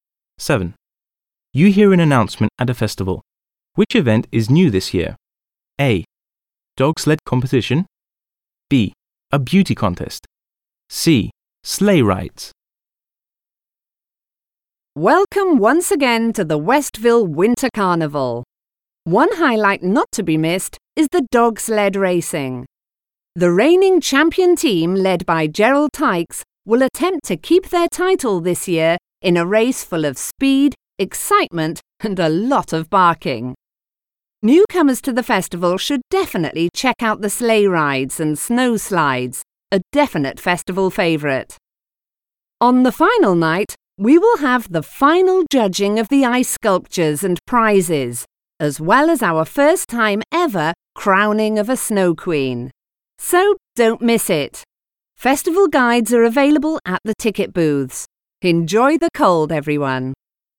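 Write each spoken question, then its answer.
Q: Which event is new this year?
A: B: A beauty contest.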